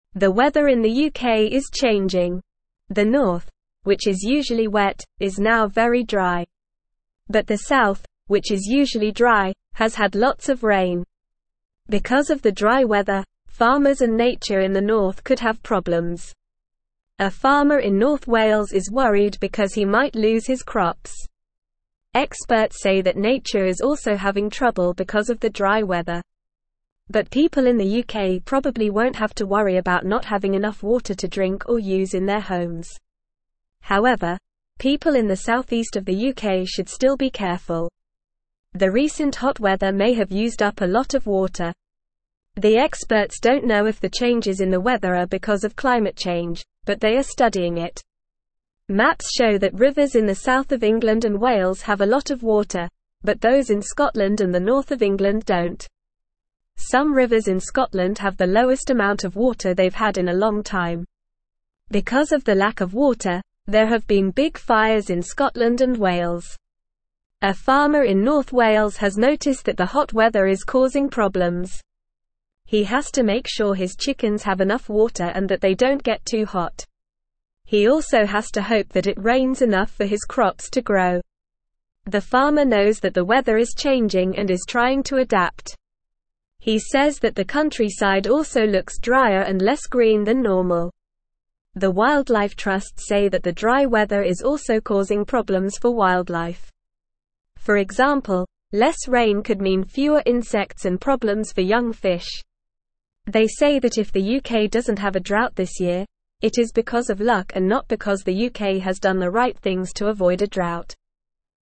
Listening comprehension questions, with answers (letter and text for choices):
Listen and Fill in the Gaps:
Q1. The north, which is usually wet, is now very (1)______.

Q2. A farmer in North Wales is worried because he might lose his (2)______.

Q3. The recent hot weather may have used up a lot of (3)______.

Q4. Because of the lack of water, there have been big fires in Scotland and (4)______.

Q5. They say that if the UK doesn't have a (6)______ this year, it is because of luck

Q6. not because the UK has done the right things to avoid a (7)______.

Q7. Who might have problems because of the dry weather in the north?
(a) The farmers and nature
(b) The people in the cities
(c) The people in the south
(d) The people in the southeast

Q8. What might happen to the farmer in North Wales because of the dry weather?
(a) He might lose his crops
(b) He might have too much water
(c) He might have too many insects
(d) He might have too much rain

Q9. What is happening to the rivers in Scotland and the north of England?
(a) They have too much water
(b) They have the same amount of water as always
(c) They are overflowing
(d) They are drying up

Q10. What problems is the farmer in North Wales facing because of the hot weather?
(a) His chickens might get too cold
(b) His crops might not grow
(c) His chickens might get too wet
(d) His crops might get too much water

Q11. What does the Wildlife Trusts say about the dry weather?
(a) It is good for wildlife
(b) It is causing problems for wildlife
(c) It is not affecting wildlife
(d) It is helping wildlife grow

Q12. What could happen if there is less rain?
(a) There could be more insects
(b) There could be more fish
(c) There could be fewer insects and problems for young fish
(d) There could be more water for the farmers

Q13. Why might the UK not have a drought this year, according to the Wildlife Trusts?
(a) Because the UK has done the right things to avoid a drought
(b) Because the UK is always wet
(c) Because the UK is always dry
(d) Because of luck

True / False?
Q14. The north of the UK is very wet now.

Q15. The south of the UK has had a lot of rain.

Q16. People in the UK are worried about not having enough water to drink.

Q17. Some rivers in Scotland have a lot of water.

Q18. There have been big fires in Scotland and Wales.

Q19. A farmer in North Wales is worried about his chickens getting too hot.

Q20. The countryside looks greener than normal.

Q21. The Wildlife Trusts say that more rain could mean fewer insects.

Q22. How is the dry weather in the north affecting farmers and nature?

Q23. What is a farmer in North Wales worried about?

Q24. Why should people in the southeast of the UK be careful?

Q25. What do the maps show about the rivers in England and Wales?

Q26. What problems is the farmer in North Wales having because of the hot weather?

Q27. What does the countryside look like now because of the weather change?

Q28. How could less rain affect insects and young fish?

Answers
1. dry
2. crops
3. water
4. Wales
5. drought
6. drought
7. (a) The farmers and nature
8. (a) He might lose his crops
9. (d) They are drying up
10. (b) His crops might not grow
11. (b) It is causing problems for wildlife
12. (c) There could be fewer insects and problems for young fish
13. (d) Because of luck
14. False
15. True
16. False
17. False
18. True
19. True
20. False
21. False
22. The dry weather is causing problems for farmers and nature in the north. Farmers might lose their crops and nature is having trouble too.
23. The farmer in North Wales is worried that he might lose his crops because of the dry weather.
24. People in the southeast of the UK should be careful because the recent hot weather may have used up a lot of water.
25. The maps show that the rivers in the south of England and Wales have a lot of water, but the rivers in Scotland and the north of England don't have much water.
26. The hot weather is causing problems for the farmer in North Wales. He has to make sure his chickens have enough water and that they don't get too hot. He also hopes it rains enough for his crops to grow.
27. Because of the weather change, the countryside looks drier and less green than normal.
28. Less rain could mean there are fewer insects and it could cause problems for young fish.

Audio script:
The weather in the UK is changing. The north, which is usually wet, is now very dry. But the south, which is usually dry, has had lots of rain. Because of the dry weather, farmers and nature in the north could have problems. A farmer in North Wales is worried because he might lose his crops. Experts say that nature is also having trouble because of the dry weather. But people in the UK probably won't have to worry about not having enough water to drink or use in their homes.
However, people in the southeast of the UK should still be careful. The recent hot weather may have used up a lot of water. The experts don't know if the changes in the weather are because of climate change, but they are studying it. Maps show that rivers in the south of England and Wales have a lot of water, but those in Scotland and the north of England don't. Some rivers in Scotland have the lowest amount of water they've had in a long time. Because of the lack of water, there have been big fires in Scotland and Wales.
A farmer in North Wales has noticed that the hot weather is causing problems. He has to make sure his chickens have enough water and that they don't get too hot. He also has to hope that it rains enough for his crops to grow. The farmer knows that the weather is changing and is trying to adapt. He says that the countryside also looks drier and less green than normal. The Wildlife Trusts say that the dry weather is also causing problems for wildlife. For example, less rain could mean fewer insects and problems for young fish. They say that if the UK doesn't have a drought this year, it is because of luck and not because the UK has done the right things to avoid a drought.
Normal
– "UK Weather Change Storytelling"
Instructions: Have students role-play a scenario where they are farmers in North Wales, experiencing the changes described in the article.

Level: Level 1